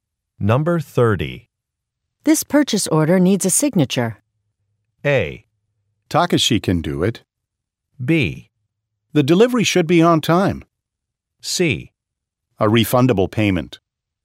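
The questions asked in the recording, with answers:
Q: This purchase order needs a signature.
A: A: Takashi can do it.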